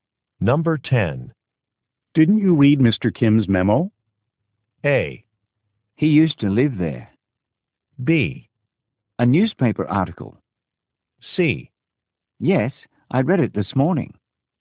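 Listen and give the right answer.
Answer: C: Yes, I read it this morning.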